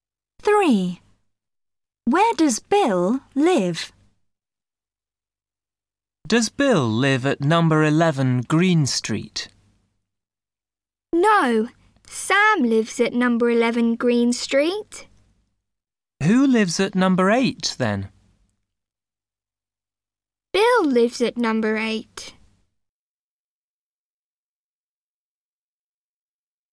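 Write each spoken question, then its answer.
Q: Where does Bill live?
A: At number 8 (Green Street)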